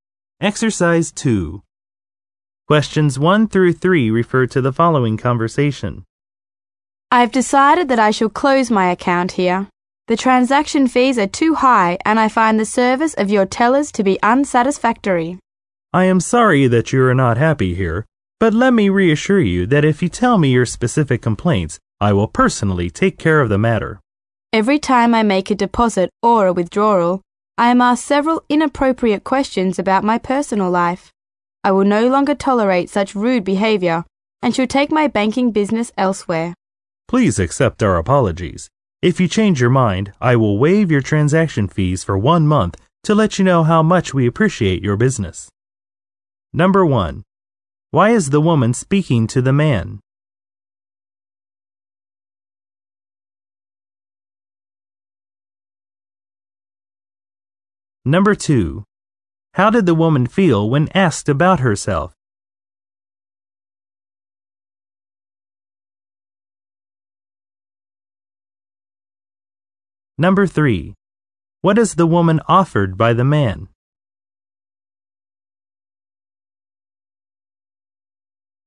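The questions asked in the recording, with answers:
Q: Why is the woman speaking to the man?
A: To close her bank account

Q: How did the woman feel when asked about herself?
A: She felt offended by the rude questions

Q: What is the woman offered by the man?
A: No transaction fees for one month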